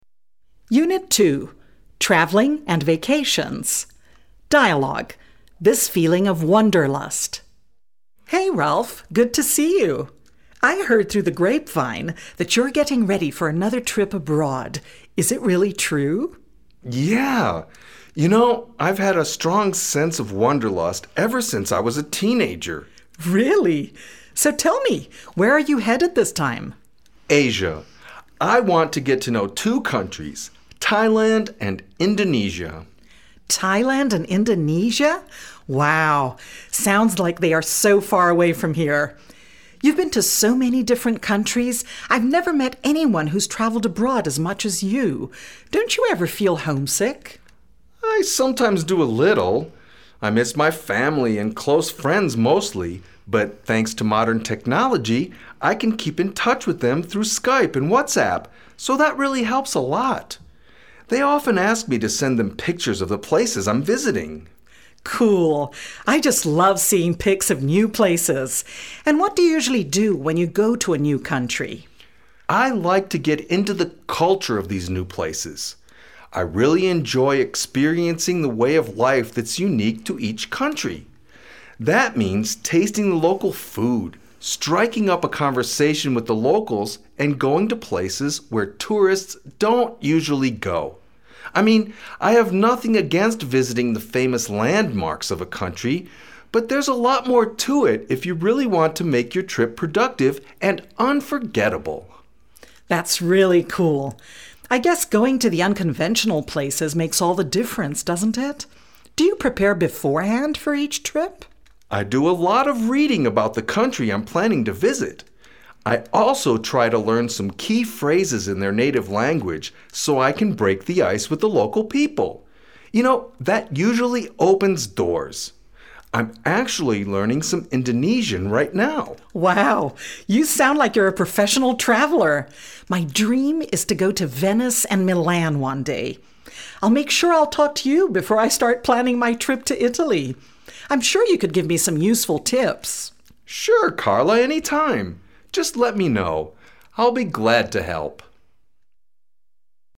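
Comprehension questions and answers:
This feeling of wanderlust – True, False or I don ́t know?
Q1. Carla is not interested at all in traveling abroad.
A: False

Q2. Ralph would rather travel alone than with friends.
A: I don ́t know

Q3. Carla agrees with Ralph that visiting the unconventional places in a country makes the trip more exciting and unique.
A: True

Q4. Carla has never traveled abroad before.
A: I don ́t know

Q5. Ralph is headed to the Philippines and Indonesia this time.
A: False

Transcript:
Dialogue Script: This feeling of wanderlust!
Carla: Hey Ralph, good to see you! I heard through the grapevine that you ́re getting ready for another trip abroad. Is it really true?
Ralph: Yeah, you know, I ́ve had a strong sense of wanderlust ever since I was a teenager.
Carla: Really? So, tell me, where are you headed this time?
Ralph: Asia. I want to get to know two countries, Thailand and Indonesia.
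Carla: Thailand and Indonesia? Wow, sounds like they are so far away from here. You ́ve been to so many different countries. I ́ve never met anyone who ́s traveled abroad as much as you. Don ́t you ever feel homesick?
Ralph: I sometimes do a little. I miss my family and close friends mostly, but thanks to modern technology I can keep in touch with them through Skype and WhatsApp, so that really helps a lot. They often ask me to send them pictures of the places I ́m visiting.
Carla: Cool! I just love seeing pics of new places. And what do you usually do when you go to a new country?
Ralph: I like to get into the culture of these new places. I really enjoy experiencing the way of life that ́s unique to each country. That means tasting the local food, striking up a conversation with the locals and going to places where tourists don ́t usually go. I mean, I have nothing against visiting the famous landmarks of a country, but there ́s a lot more to it if you really want to make your trip productive and unforgettable.
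Carla: That ́s really cool! I guess going to the unconventional places makes all the difference, doesn ́t it? Do you prepare beforehand for each trip?
Ralph: I do a lot of reading about the country I ́m planning to visit. I also try to learn some key phrases in their native language so I can break the ice with the local people. You know, that usually opens doors. I ́m actually learning some Indonesian right now.
Carla: Wow, you sound like you ́re a professional traveler! My dream is to go to Venice and Milan one day. I ́ll make sure I ́ll talk to you before I start planning my trip to Italy. I ́m sure you could give me some useful tips!
Ralph: Sure Carla, anytime! Just let me know. I ́ll be glad to help.

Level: B2/A1 level students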